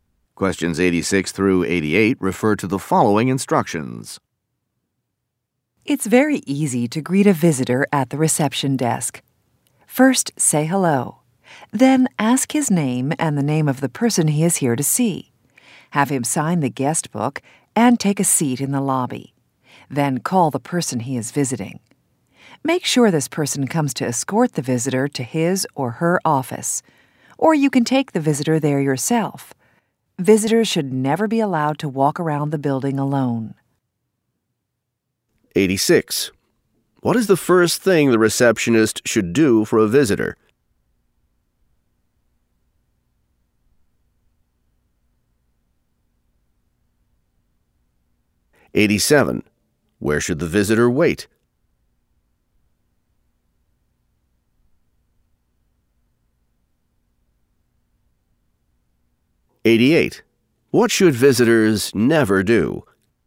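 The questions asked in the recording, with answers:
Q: What is the first thing the receptionist should do for a visitor?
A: Say hello

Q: Where should the visitor wait?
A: In the lobby

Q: What should visitors never do?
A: Walk around the building alone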